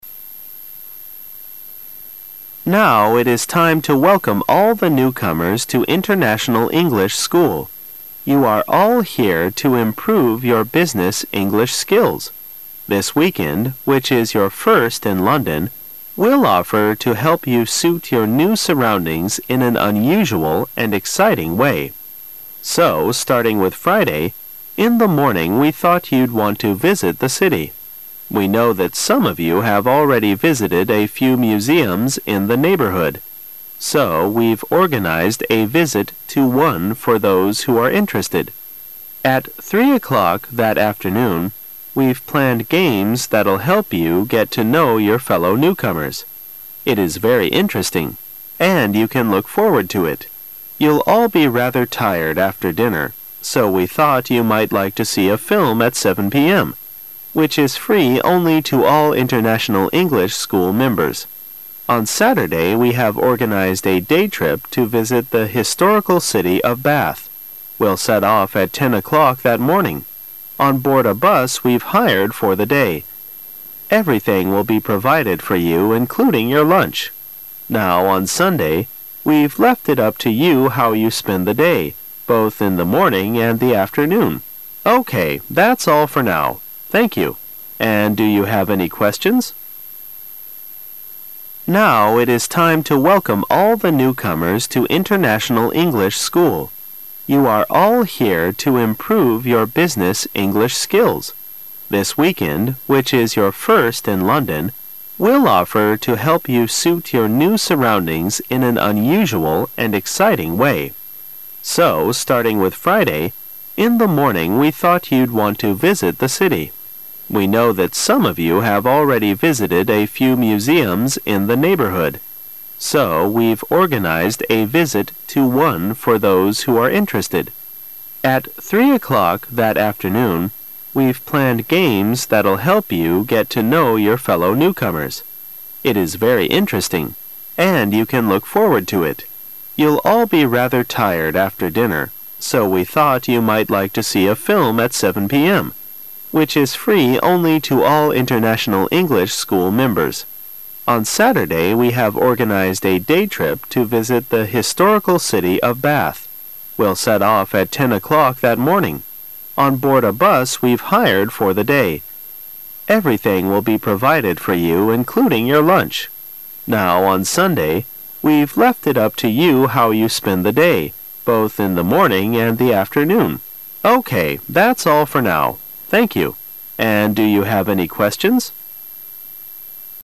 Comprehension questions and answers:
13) What will the newcomers do on Friday afternoon?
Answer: They will play games.

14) Whom will the film be free to?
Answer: International English School members.

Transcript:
[解析] 17-20 Now it is time to welcome all the newcomers to International English School. You are all here to improve your business English skills. This weekend, which is your first in London, we'll offer to help you suit your new surroundings in an unusual and exciting way. So, starting with Friday, in the morning we thought you'd want to visit the city. We know that some of you have already visited a few muse ums in the neighborhood, so we've organized a visit to one for those who are interested. At 3 o'clock that afternoon, we've planned games that'll help you get to know your fellow newcomers. It is very interesting, and you can look forward to it. You'll all be rather tired after dinner so we thought you might like to see a film at 7 p. m. , which is free only to all International English School members. On Saturday we have organized a day trip to visit the historical city of Bath. We'll set off at 10 o'clock that morning, on board a bus we've hired for the day. Everything will be provided for you including your lunch. Now on Sunday, we've left it up to you how you spend the day, both in the morning and the afternoon. OK, that's all for now. Thank you. And do you have any questions?